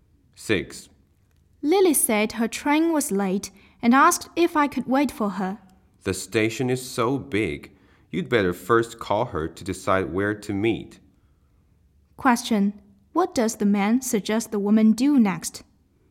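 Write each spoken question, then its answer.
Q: What does the man suggest the woman do next?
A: Call Lily first to decide where to meet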